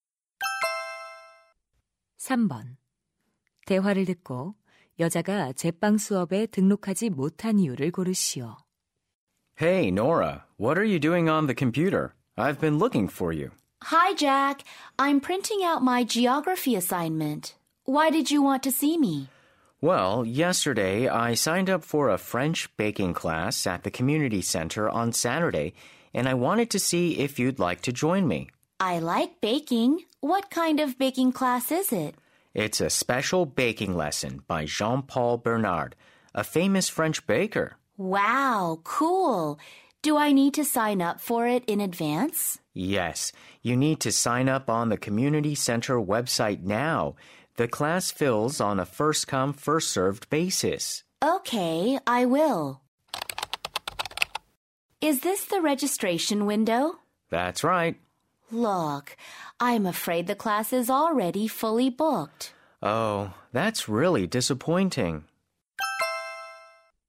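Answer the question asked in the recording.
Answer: 수업이 이미 마감되어서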